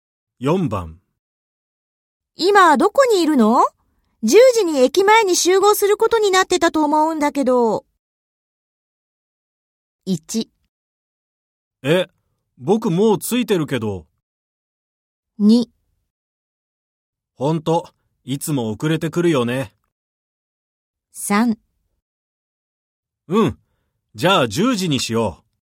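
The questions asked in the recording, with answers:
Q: 今どこにいるの?10時に駅前に集合することになってたと思うんだけど。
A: 1: え、僕もう着いてるけど。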